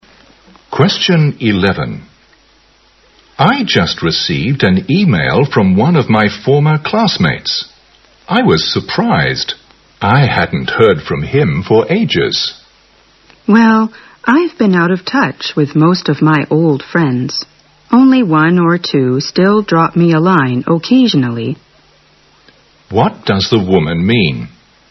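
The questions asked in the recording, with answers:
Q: What does the woman mean?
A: She has lost touch with most of her old friends; only one or two still write to her now and then.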